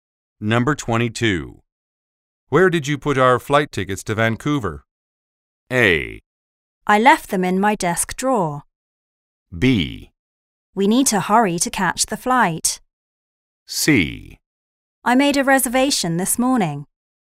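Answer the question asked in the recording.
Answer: A: I left them in my desk drawer.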